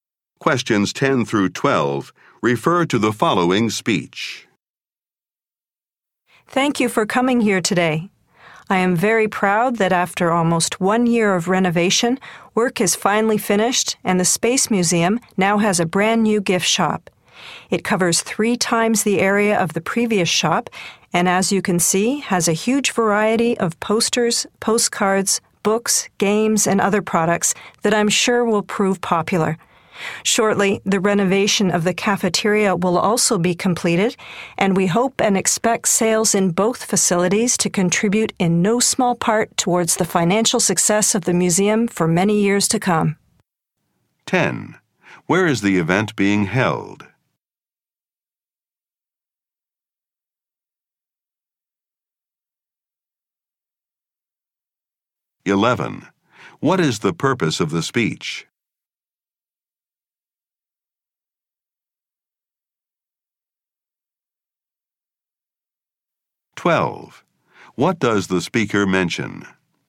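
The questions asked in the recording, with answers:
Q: Where is the event being held?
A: In the Space Museum's new gift shop

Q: What is the purpose of the speech?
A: To open the new gift shop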